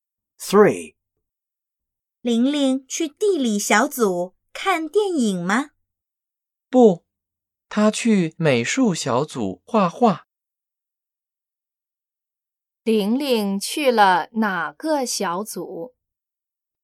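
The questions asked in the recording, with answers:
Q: 玲玲去了哪个小组?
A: 美术小组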